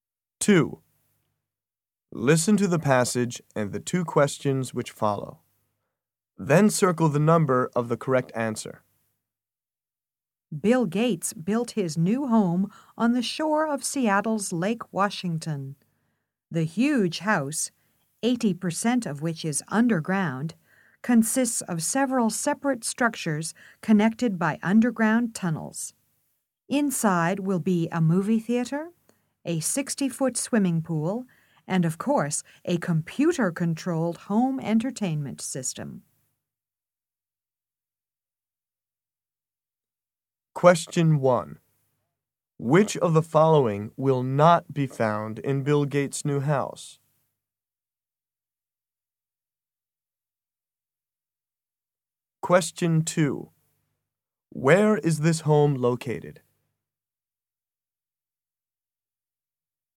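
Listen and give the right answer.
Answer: On the shore of Lake Washington in Seattle.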